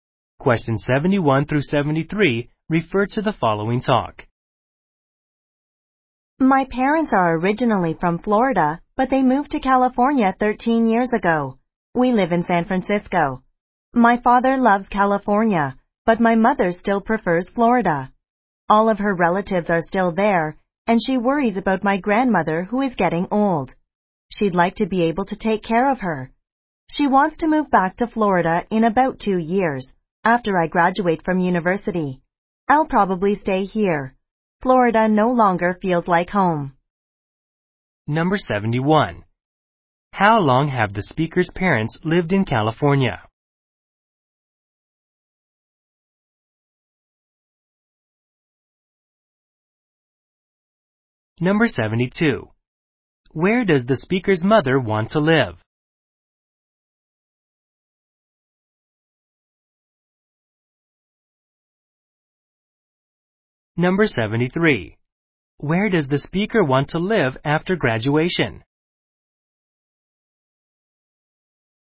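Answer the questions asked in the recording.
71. 13 years
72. Florida
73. San Francisco, California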